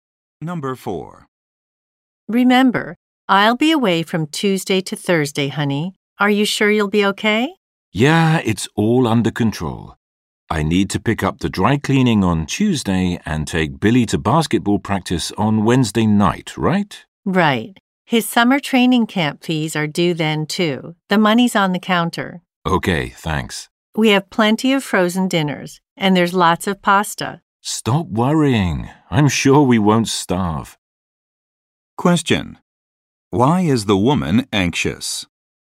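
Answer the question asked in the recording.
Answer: She is worried the man won't manage the household tasks while she is away.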